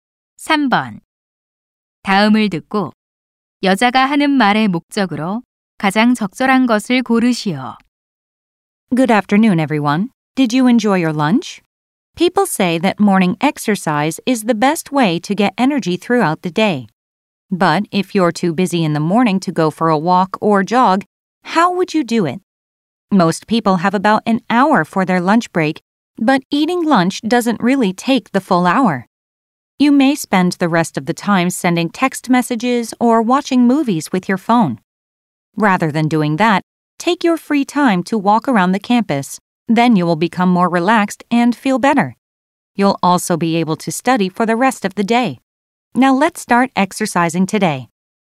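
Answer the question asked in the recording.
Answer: 점심시간에 캠퍼스를 걸으며 운동하도록 권장하려고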